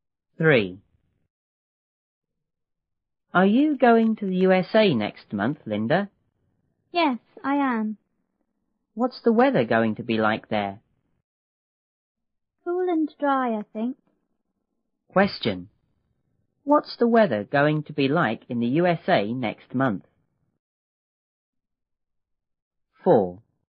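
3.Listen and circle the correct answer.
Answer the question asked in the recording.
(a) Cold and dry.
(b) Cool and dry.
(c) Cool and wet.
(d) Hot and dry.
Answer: (b) Cool and dry.

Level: 六年级下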